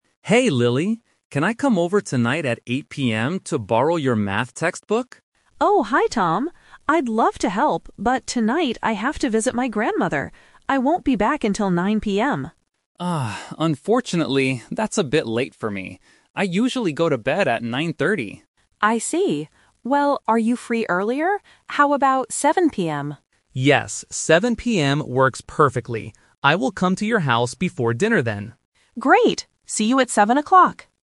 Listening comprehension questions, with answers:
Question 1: What time will Tom go to Lily's house?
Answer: 7:00 PM

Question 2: Why can't Lily meet Tom at 8:00 PM?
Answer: She is visiting her family.

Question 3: Why doesn't Tom want to come at 9:00 PM?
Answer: He goes to sleep early.